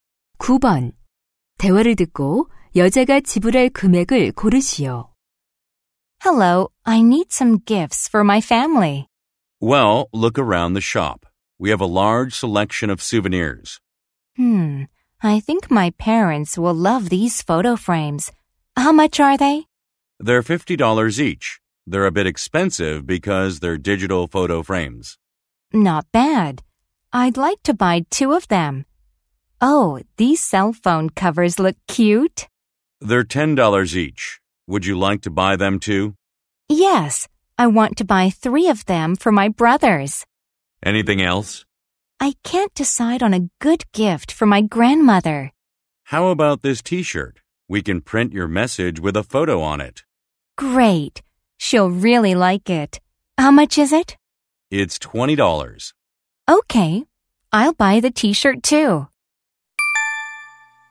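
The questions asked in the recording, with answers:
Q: 대화를 듣고 여자가 지불할 금액을 고르시오.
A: $150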